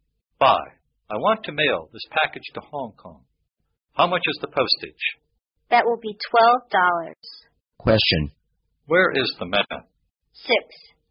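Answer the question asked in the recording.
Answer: At a post office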